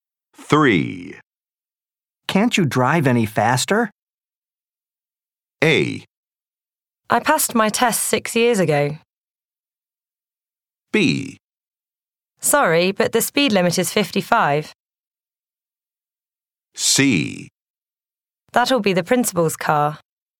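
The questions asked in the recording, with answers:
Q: Can't you drive any faster?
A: B: Sorry, but the speed limit is 55.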